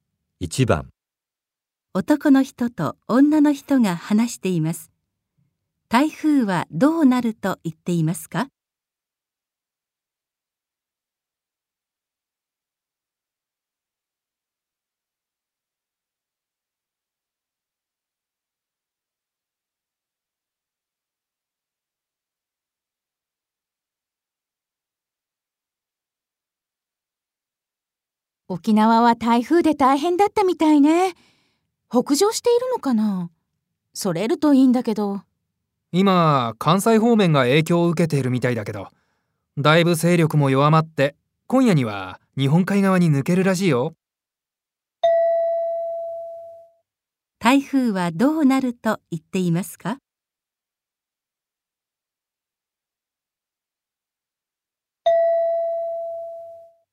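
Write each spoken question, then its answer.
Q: 台風はどうなると言っていますか?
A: 勢力が弱まって今夜には日本海側に抜ける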